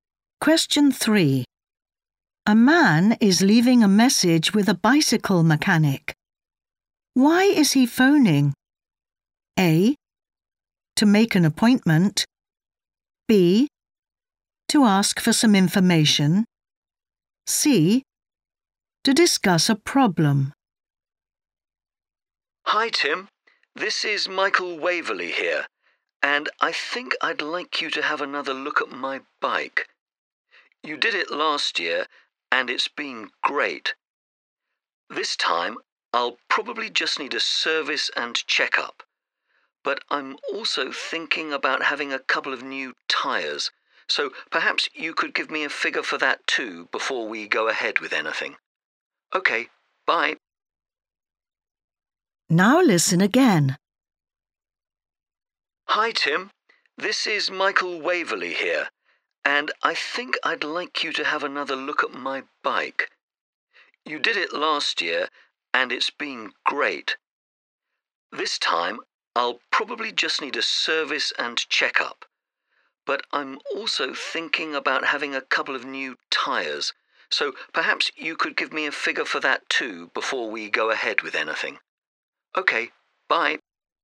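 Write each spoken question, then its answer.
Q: Why is he phoning?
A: B: To ask for some information.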